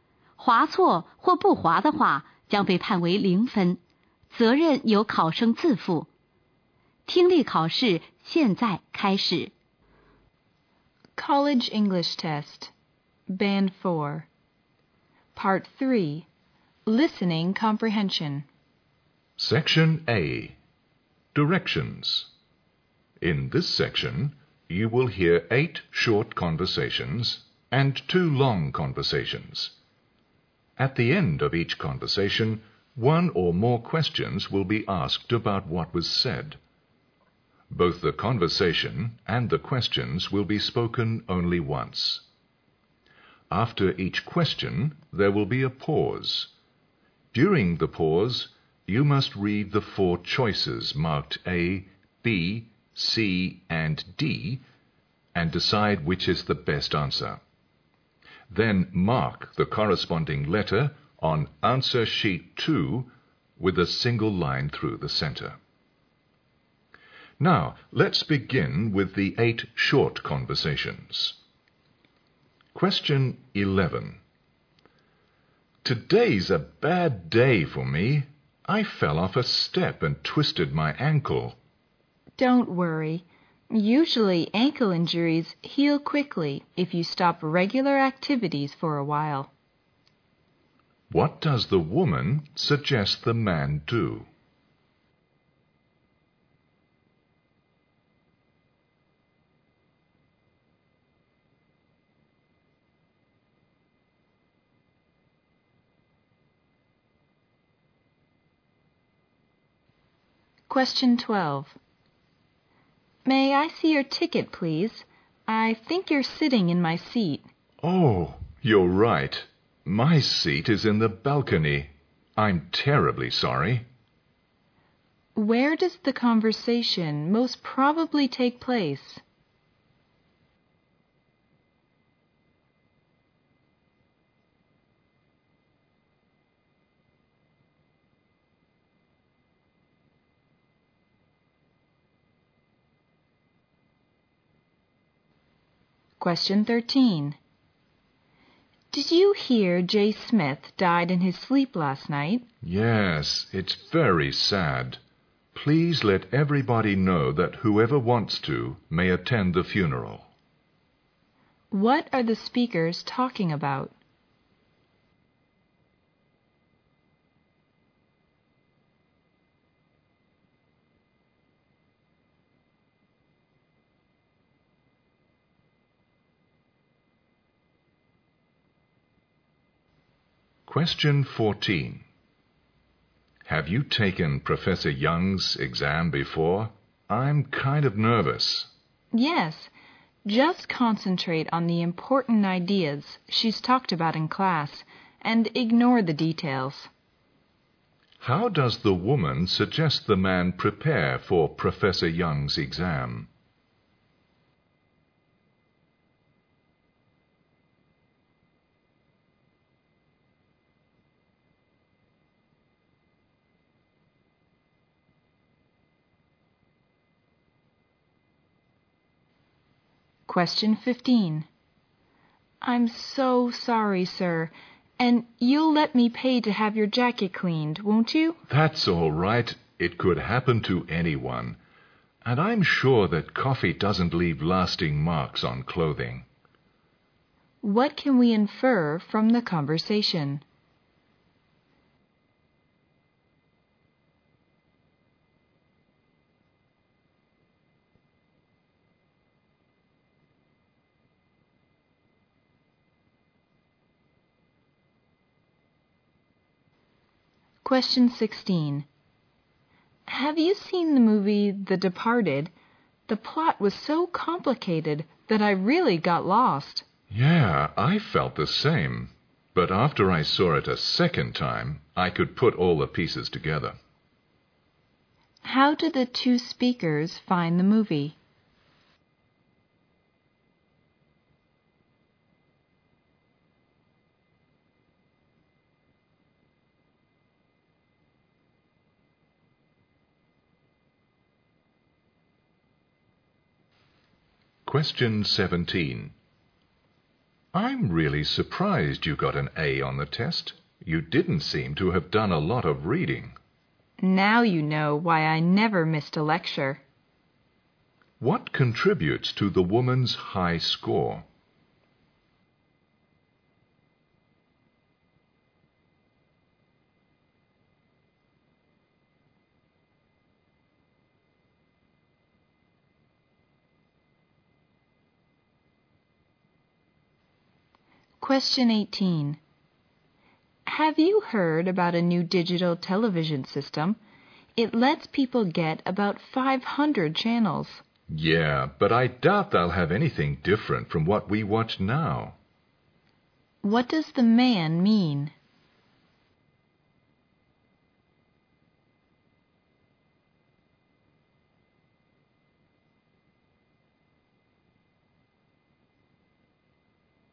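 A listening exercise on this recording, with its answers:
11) What does the woman suggest the man do?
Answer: Stop regular activities for a while.

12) Where does the conversation most probably take place?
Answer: In a theatre.

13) What are the speakers talking about?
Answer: Mr. Smith's death and funeral.

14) How does the woman suggest the man prepare for Professor Young's exam?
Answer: Concentrate on the important ideas from class and ignore the details.

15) What can we infer from the conversation?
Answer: The woman spilled coffee on the man's jacket.

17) What contributes to the woman's high score?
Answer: She attended every lecture.

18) What does the man mean?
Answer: The new channels will offer nothing different.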